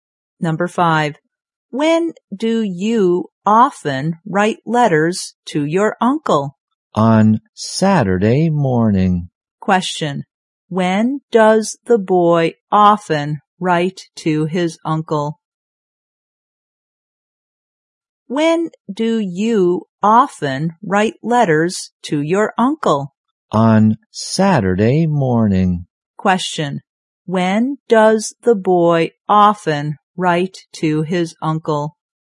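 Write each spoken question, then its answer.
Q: when does the boy often write to his uncle?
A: On Saturday morning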